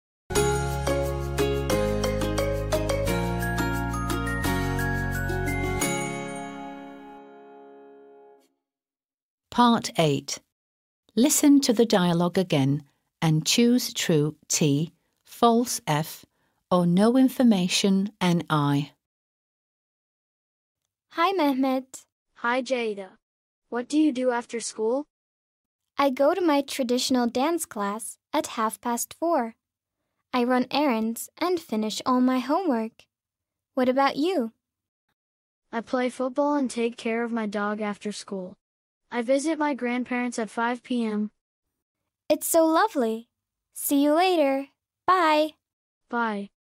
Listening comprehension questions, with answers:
8. Listen to the dialogue again and choose True (T) / False (F) or No Information (NI).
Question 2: Ceyda attends a traditional dance class.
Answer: True

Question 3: Ceyda plays basketball after school.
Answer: False

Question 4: Mehmet takes care of his cat.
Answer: False

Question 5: Mehmet visits his grandparents at 5 p.m.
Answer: True

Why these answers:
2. Geleneksel dans kursuna gittiğini söylüyor.
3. Ceyda dans kursuna gider, işlerini halleder ve ödev yapar; basketbolden bahsetmiyor.
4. Mehmet kedisine değil köpeğine bakar.
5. Büyükanne/büyükbabasını akşam 5'te ziyaret eder.

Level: 6. Sınıf